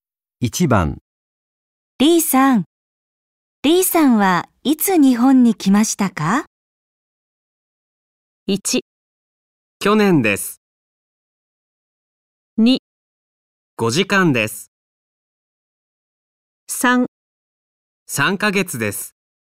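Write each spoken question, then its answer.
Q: リーさん、リーさんはいつ日本に来ましたか?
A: 1: 去年です。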